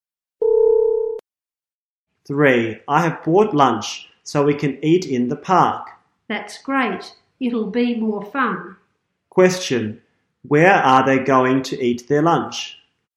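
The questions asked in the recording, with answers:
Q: where are they going to eat their lunch?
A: In the park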